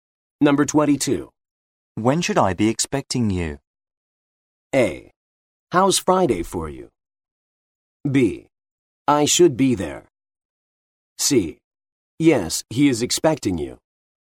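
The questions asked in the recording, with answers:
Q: When should I be expecting you?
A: A: How's Friday for you?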